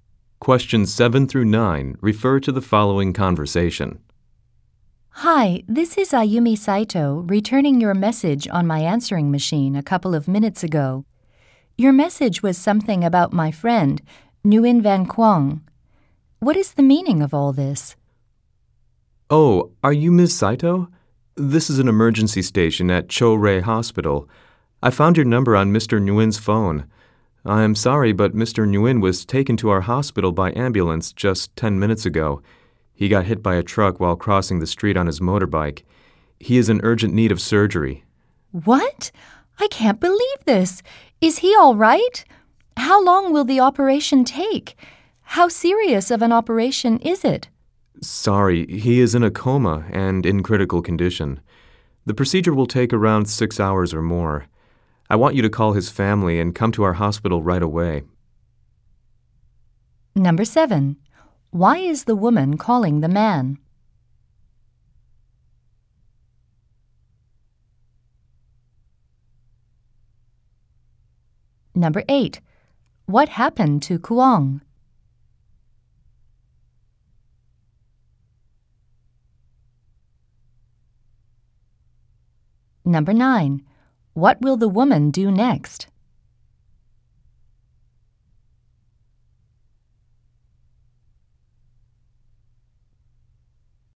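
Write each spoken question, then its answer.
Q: Why is the woman calling the man?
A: To return his message on her answering machine

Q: What happened to Kuang?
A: He was hit by a truck while crossing the street on his motorbike

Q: What will the woman do next?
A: Call his family and go to the hospital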